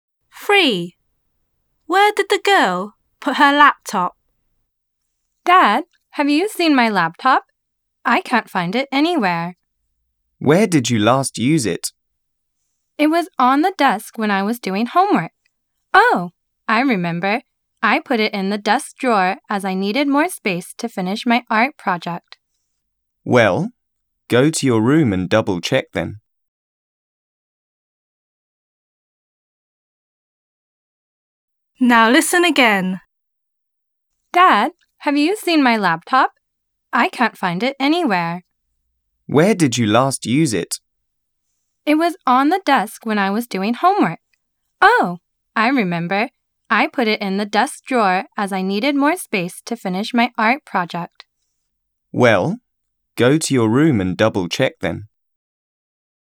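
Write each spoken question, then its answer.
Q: Where did the girl put her laptop?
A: In the desk drawer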